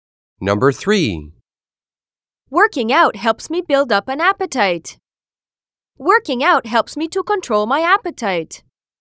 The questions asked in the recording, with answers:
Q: Working out helps me build up an appetite.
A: Different is the correct answer.